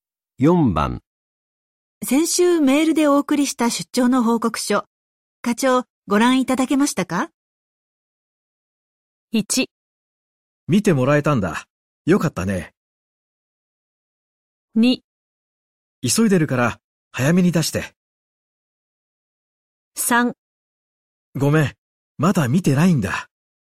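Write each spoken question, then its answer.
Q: 先週メールでお送りした出張の報告書、課長、ご覧いただけましたか?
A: 3: ごめん、まだ見てないんだ。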